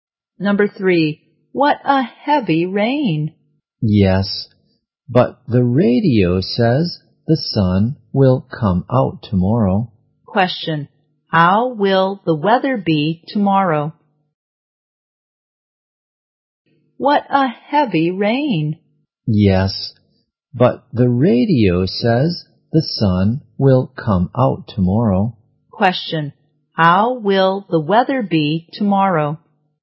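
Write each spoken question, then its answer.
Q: how will the weather be tomorrow?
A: Sunny.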